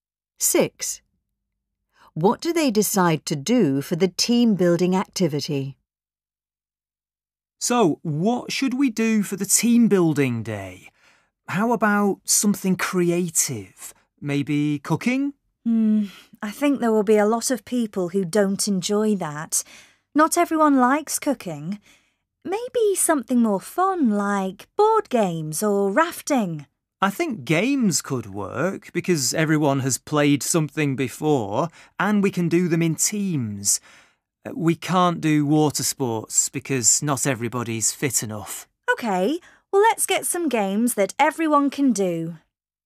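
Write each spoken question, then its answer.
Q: What do they decide to do for the team-building activity?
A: Play games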